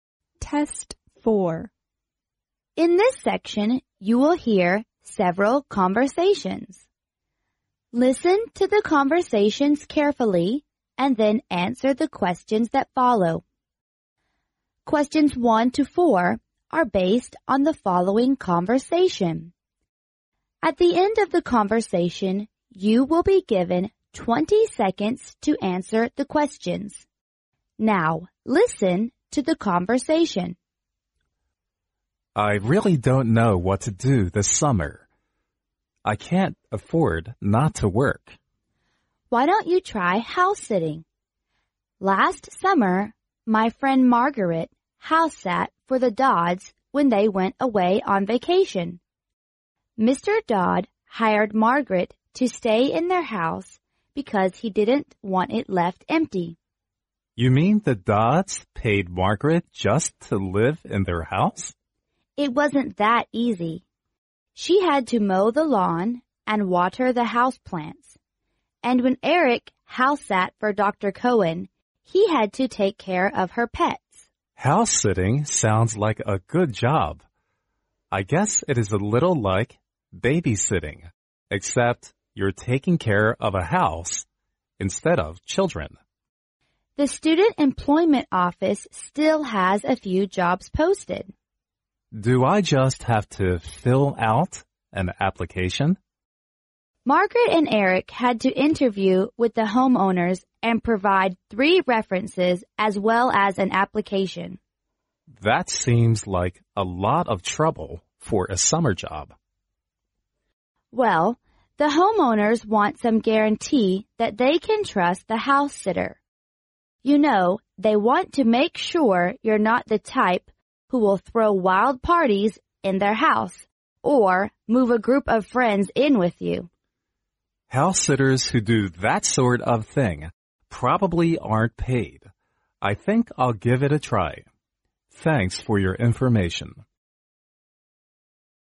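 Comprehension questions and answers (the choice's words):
Now, listen to the conversation.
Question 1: What does the man want to do this summer?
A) To do house-sitting.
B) To do baby-sitting.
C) To find a job.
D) To stay at home.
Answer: To find a job.

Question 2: What did the Dodds do when they went away last summer?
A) They went camping.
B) They were on vacation.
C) They went abroad.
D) They went to visit their friends.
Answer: They were on vacation.

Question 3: What is the responsibility the house-sitter probably would NOT have?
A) To live in the owner's house.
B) To mow the lawn and water the house-plants.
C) To take care of the owner's pets.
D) To take care of the children.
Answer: To take care of the children.

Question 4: Which Is NOT mentioned to determine the reliability of a house-sitter?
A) The candidate has to fill out an application.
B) The candidate has to interview with the homeowners.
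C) The candidate has to provide three references.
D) The candidate has to offer his work record.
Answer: The candidate has to offer his work record.

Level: 英语四级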